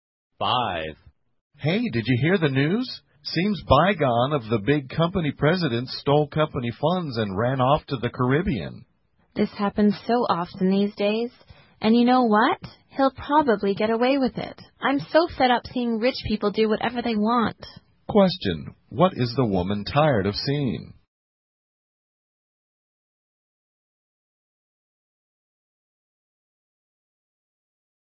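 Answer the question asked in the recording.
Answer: Rich people doing whatever they want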